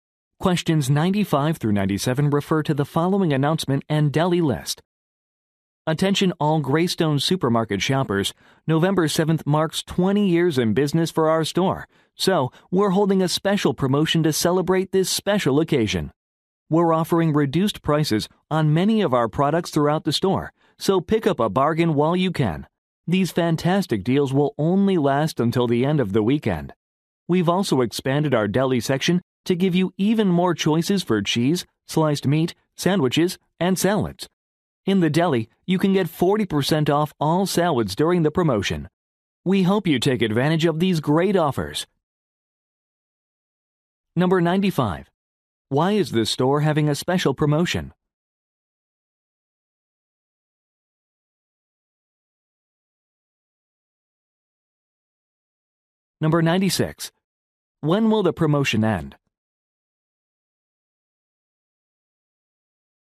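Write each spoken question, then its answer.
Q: Why is this store having a special promotion?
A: To celebrate 20 years in business

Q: When will the promotion end?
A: At the end of the weekend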